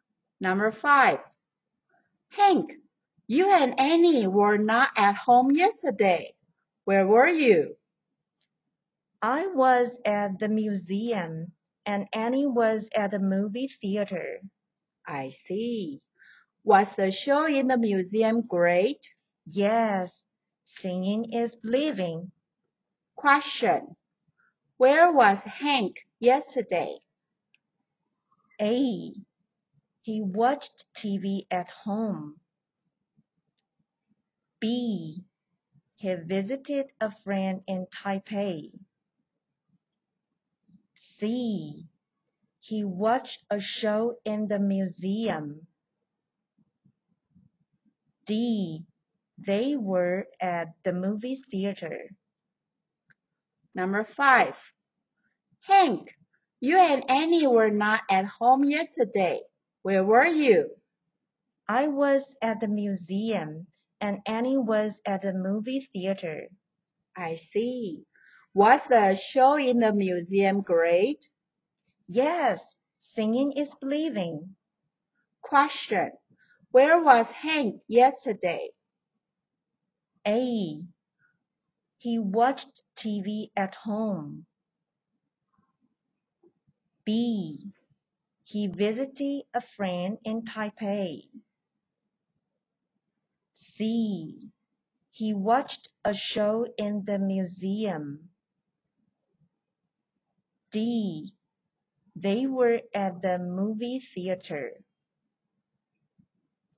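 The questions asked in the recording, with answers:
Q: Where was Hank yesterday?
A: C: He watched a show in the museum.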